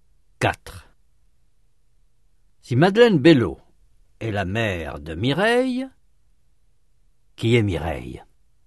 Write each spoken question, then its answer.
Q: Si Madeleine Bello est la mère de Mireille, qui est Mireille?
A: La fille de Madeleine Bello.